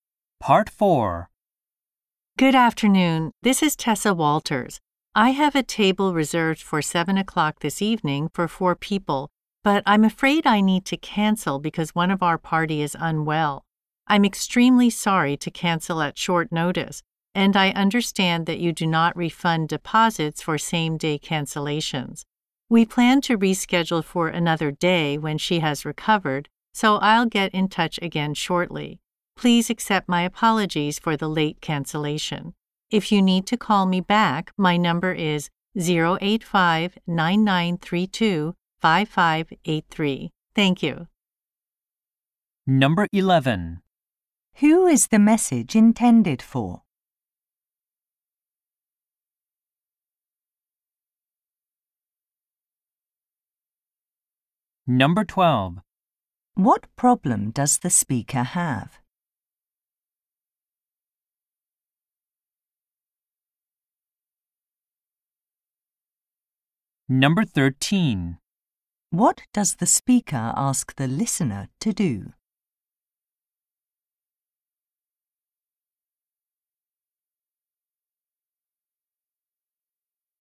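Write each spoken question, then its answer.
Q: Who is the message intended for?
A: A restaurant

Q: What problem does the speaker have?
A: She must cancel her reservation because one of her party is unwell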